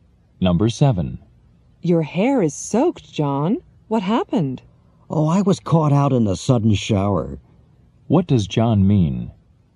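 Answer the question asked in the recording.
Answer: He got caught in the rain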